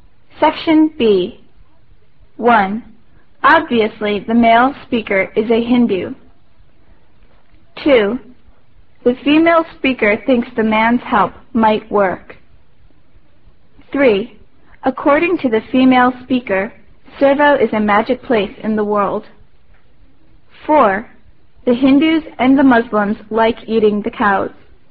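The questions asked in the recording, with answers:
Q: Obviously, the male speaker is a Hindu.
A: False

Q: The female speaker thinks the man's help might work.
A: False

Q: According to the female speaker, Servo is a magic place in the world.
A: False

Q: The Hindus and the Muslims like eating the cows.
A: False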